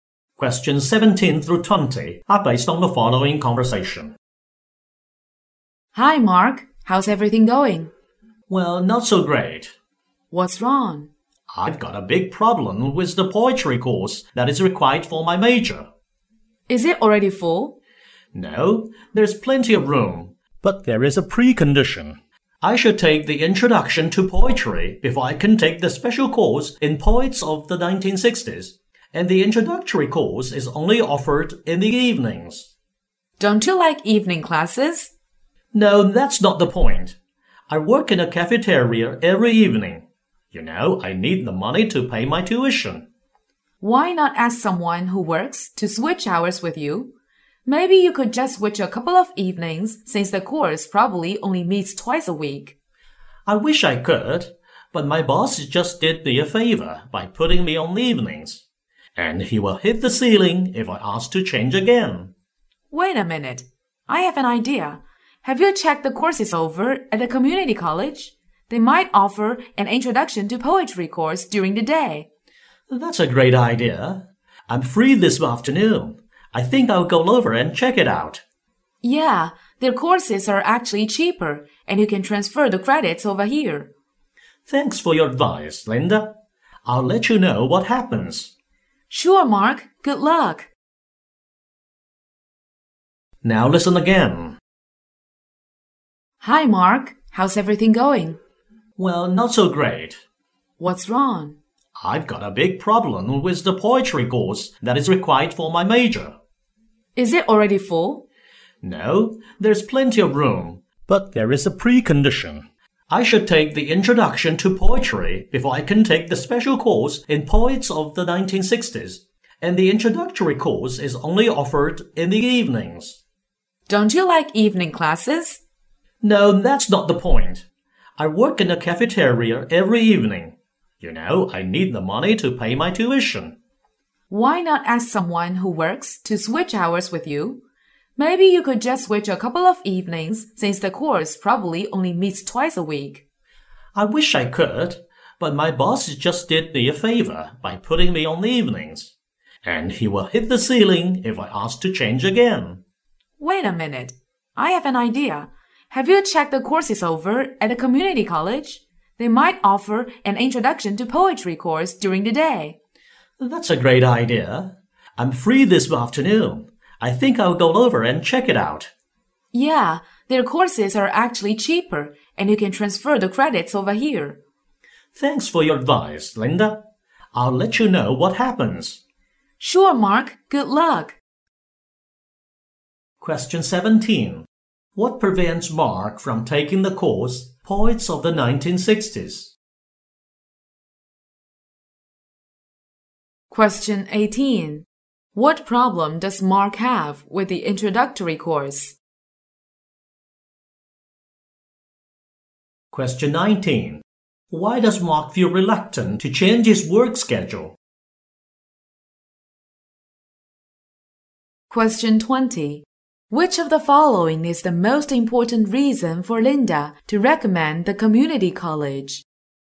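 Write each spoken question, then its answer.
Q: What prevents Mark from taking the course Poets of the 1960s?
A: He must first take Introduction to Poetry

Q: What problem does Mark have with the introductory course?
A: It is only offered in the evenings, when he works

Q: Why does Mark feel reluctant to change his work schedule?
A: His boss already changed it for him and would be angry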